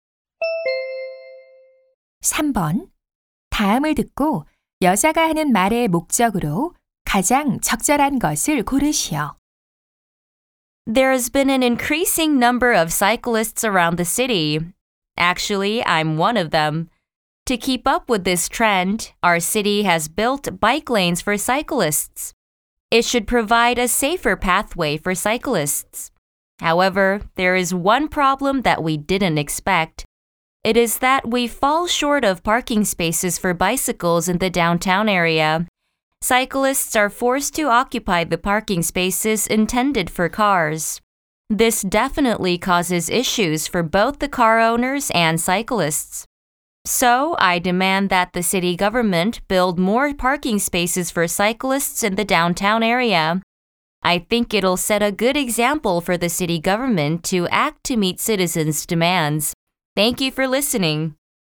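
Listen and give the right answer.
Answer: 시내에 자전거 주차 공간을 더 만들 것을 요구하려고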